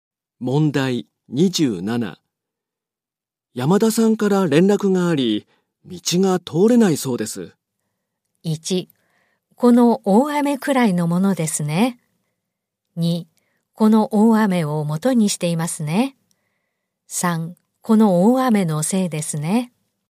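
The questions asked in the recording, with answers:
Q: 山田さんから連絡があり、道が通れないそうです。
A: 3: この大雨のせいですね。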